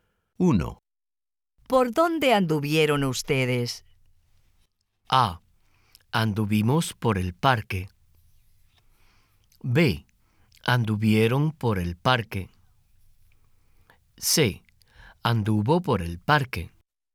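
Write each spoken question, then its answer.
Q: ¿Por dónde anduvieron ustedes?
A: A: Anduvimos por el parque.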